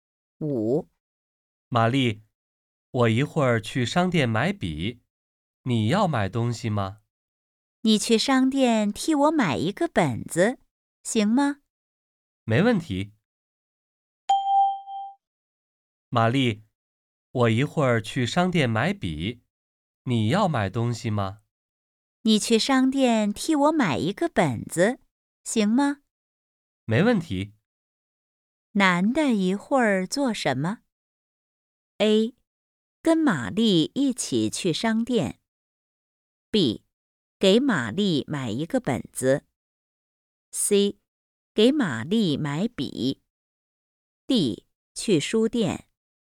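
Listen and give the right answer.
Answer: B: 给玛丽买一个本子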